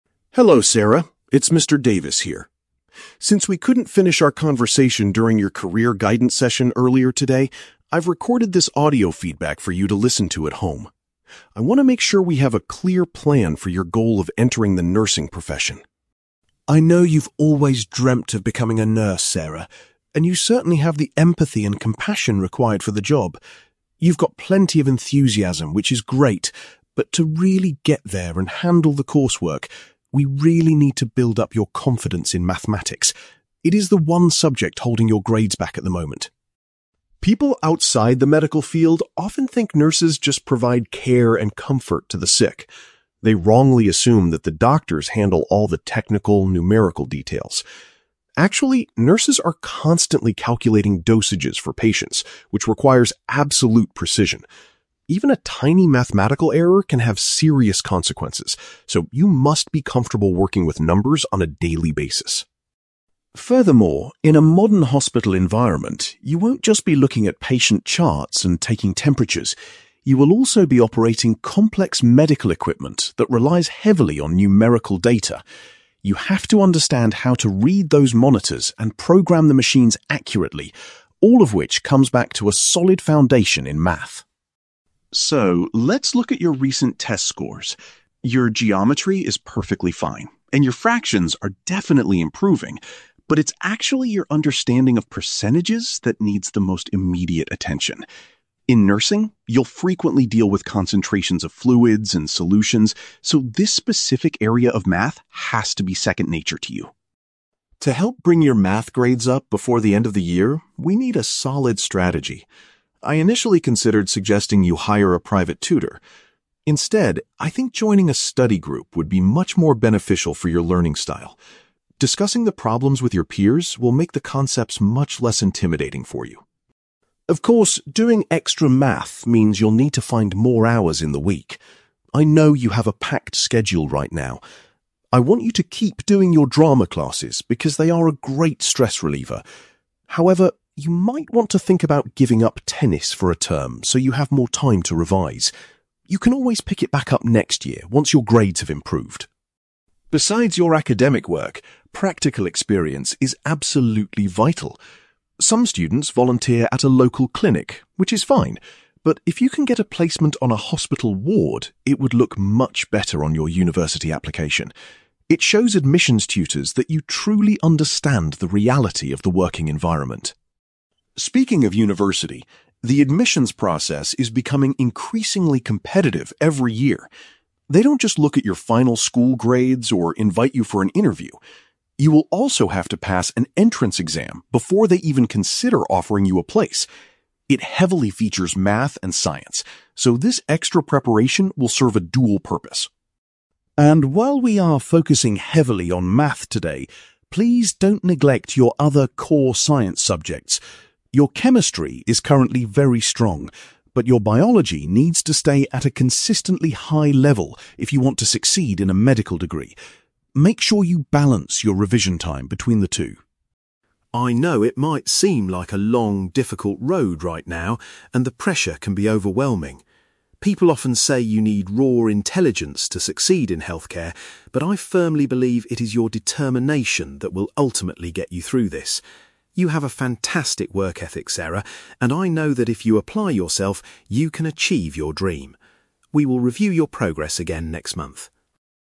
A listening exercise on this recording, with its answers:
You will hear a teacher called Mr. Davis recording a message for a student named Sarah about preparing for a career in nursing. For questions 9-18, complete the sentences with a word or short phrase.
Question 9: Mr. Davis believes that Sarah needs to improve her (9)........................... when it comes to math.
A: confidence

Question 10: According to Mr. Davis, nurses must be highly accurate when figuring out the (10)........................... of medicine for patients.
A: dosages

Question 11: Mr. Davis points out that nursing staff use advanced (11)........................... that involves understanding numbers.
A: equipment

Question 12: Mr. Davis identifies (12)........................... as the specific area of math that Sarah must focus on right now.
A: percentages

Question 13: Rather than working alone with a tutor, Mr. Davis recommends that Sarah joins a (13)........................... .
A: study group

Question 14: Sarah is advised to stop playing (14)........................... temporarily to free up time for revision.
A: tennis

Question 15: Mr. Davis suggests that gaining work experience on a (15)........................... will improve Sarah's university application.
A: hospital ward

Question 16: Sarah will need to successfully complete an (16)........................... to be accepted into a university nursing program.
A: entrance exam

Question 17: Mr. Davis reminds Sarah that achieving a good grade in (17)........................... is also essential for her career choice.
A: biology

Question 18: Mr. Davis feels that Sarah's (18)........................... is the most important quality she has for achieving her goals.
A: determination

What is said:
Mr. Davis: Hello Sarah, it's Mr. Davis here. Since we couldn't finish our conversation during your career guidance session earlier today, I've recorded this audio feedback for you to listen to at home. I want to make sure we have a clear plan for your goal of entering the nursing profession.
I know you've always dreamt of becoming a nurse, Sarah, and you certainly have the empathy and compassion required for the job. You've got plenty of enthusiasm, which is great, but to really get there and handle the coursework, we really need to build up your confidence in mathematics. It is the one subject holding your grades back at the moment.
People outside the medical field often think nurses just provide care and comfort to the sick. They wrongly assume that the doctors handle all the technical, numerical details. Actually, nurses are constantly calculating dosages for patients, which requires absolute precision. Even a tiny mathematical error can have serious consequences, so you must be comfortable working with numbers on a daily basis.
Furthermore, in a modern hospital environment, you won't just be looking at patient charts and taking temperatures. You will also be operating complex medical equipment that relies heavily on numerical data. You have to understand how to read those monitors and program the machines accurately, all of which comes back to a solid foundation in math.
So, let's look at your recent test scores. Your geometry is perfectly fine, and your fractions are definitely improving, but it's actually your understanding of percentages that needs the most immediate attention. In nursing, you'll frequently deal with concentrations of fluids and solutions, so this specific area of math has to be second nature to you.
To help bring your math grades up before the end of the year, we need a solid strategy. I initially considered suggesting you hire a private tutor. Instead, I think joining a study group would be much more beneficial for your learning style. Discussing the problems with your peers will make the concepts much less intimidating for you.
Of course, doing extra math means you'll need to find more hours in the week. I know you have a packed schedule right now. I want you to keep doing your drama classes because they are a great stress reliever. However, you might want to think about giving up tennis for a term so you have more time to revise. You can always pick it back up next year once your grades have improved.
Besides your academic work, practical experience is absolutely vital. Some students volunteer at a local clinic, which is fine, but if you can get a placement on a hospital ward, it would look much better on your university application. It shows admissions tutors that you truly understand the reality of the working environment.
Speaking of university, the admissions process is becoming increasingly competitive every year. They don't just look at your final school grades or invite you for an interview. You will also have to pass an entrance exam before they even consider offering you a place. It heavily features math and science, so this extra preparation will serve a dual purpose.
And while we are focusing heavily on math today, please don't neglect your other core science subjects. Your chemistry is currently very strong, but your biology needs to stay at a consistently high level if you want to succeed in a medical degree. Make sure you balance your revision time between the two.
I know it might seem like a long, difficult road right now, and the pressure can be overwhelming. People often say you need raw intelligence to succeed in healthcare, but I firmly believe it is your determination that will ultimately get you through this. You have a fantastic work ethic, Sarah, and I know that if you apply yourself, you can achieve your dream. We will review your progress again next month.

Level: B2